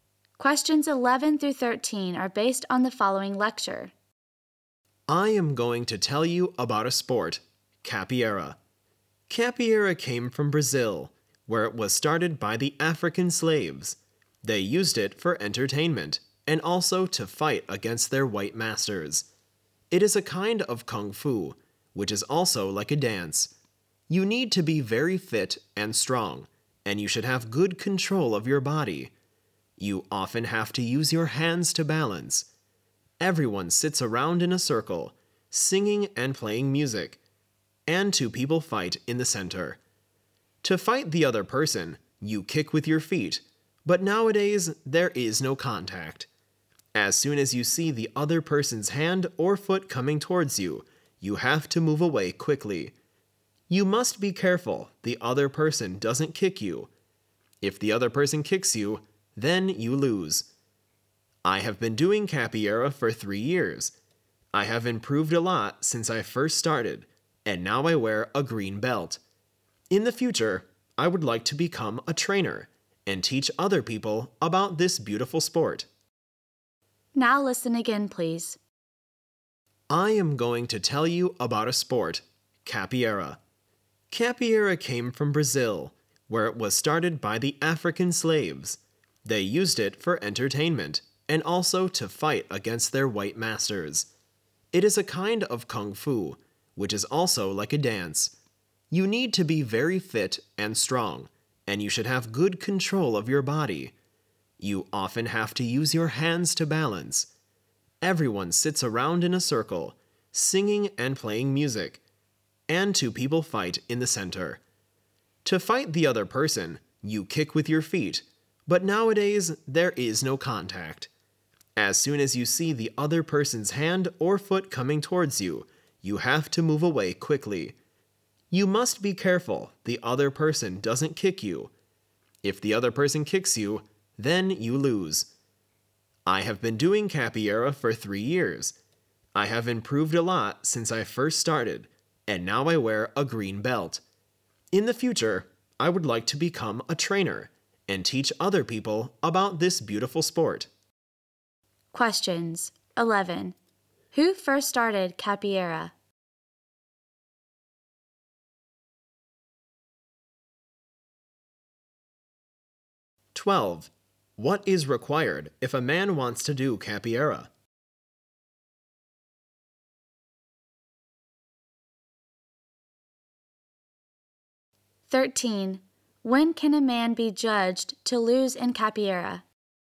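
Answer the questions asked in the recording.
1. African slaves in Brazil
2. Being fit and strong with good body control
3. When the other person kicks him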